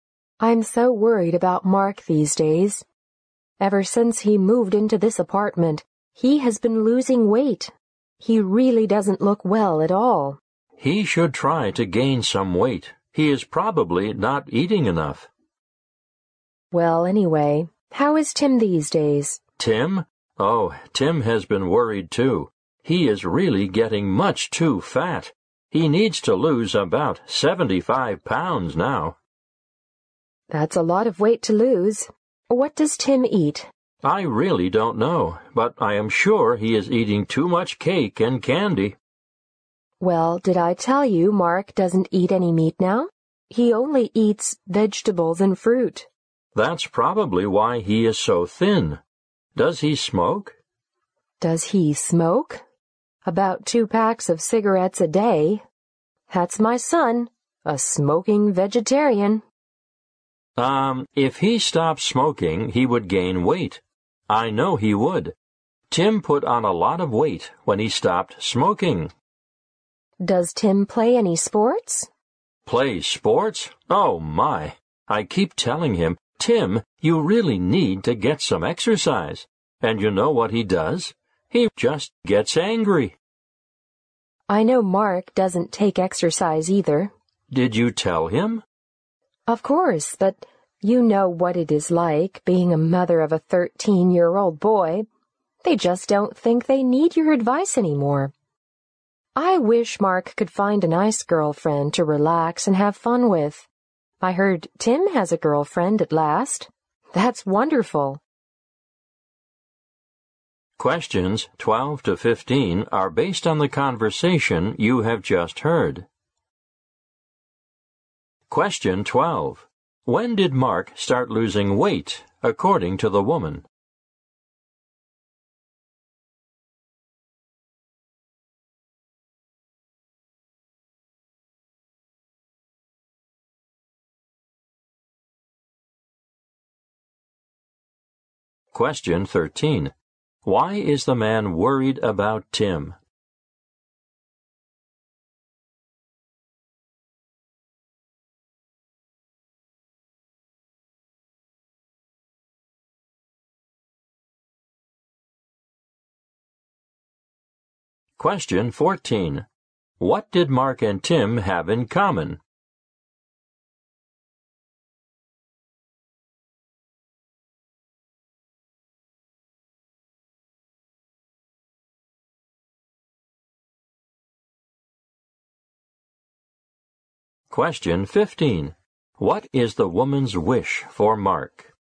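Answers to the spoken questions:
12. Ever since he moved into his apartment
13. Tim is much too fat
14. Neither of them takes any exercise
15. That he finds a nice girlfriend to relax and have fun with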